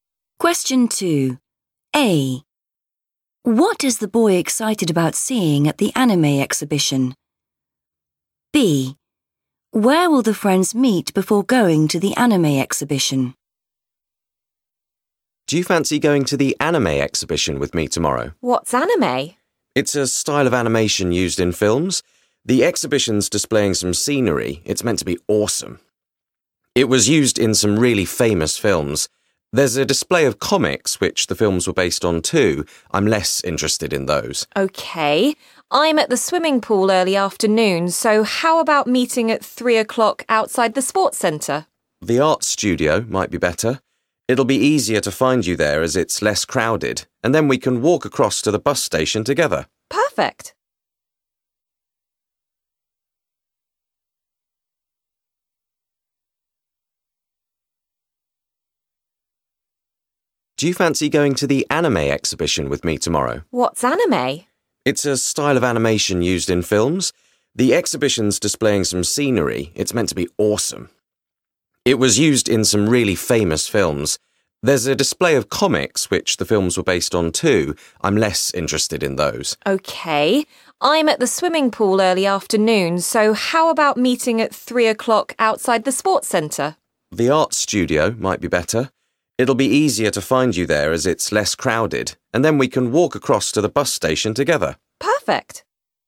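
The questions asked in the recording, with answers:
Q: What is the boy excited about seeing at the anime exhibition?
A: scenery

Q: Where will the friends meet before going to the anime exhibition?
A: the art studio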